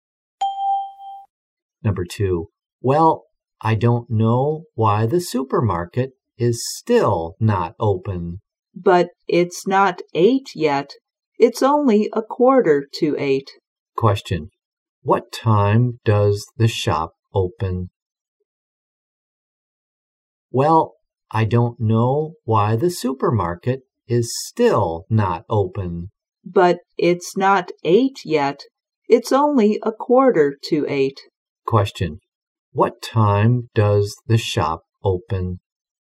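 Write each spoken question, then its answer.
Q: What time does the shop open?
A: At 8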